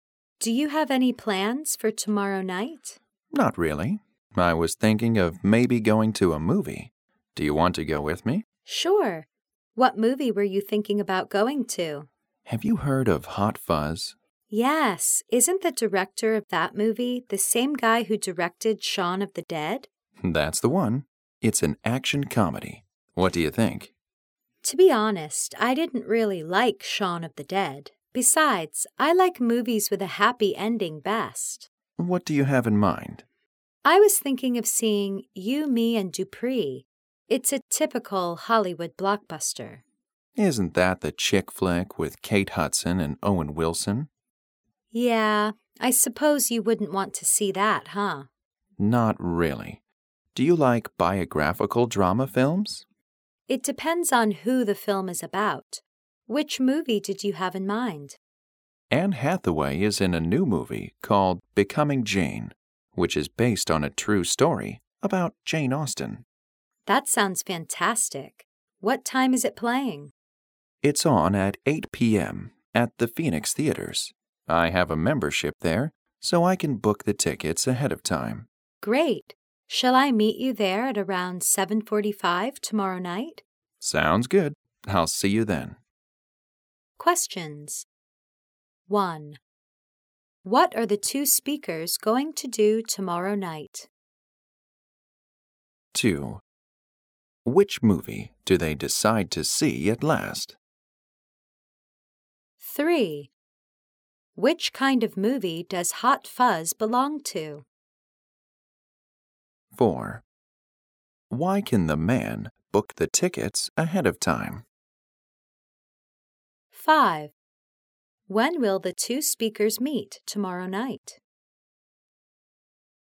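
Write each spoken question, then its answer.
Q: What are the two speakers going to do tomorrow night?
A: Go to a movie

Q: Which movie do they decide to see at last?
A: Becoming Jane

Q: Which kind of movie does Hot Fuzz belong to?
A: An action comedy

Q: When will the two speakers meet tomorrow night?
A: At around 7:45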